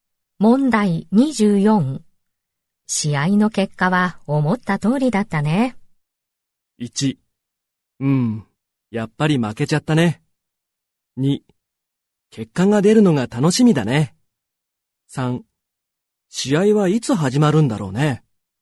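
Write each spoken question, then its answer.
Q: 試合の結果は思った通りだったね。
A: 1: うん、やっぱり負けちゃったね。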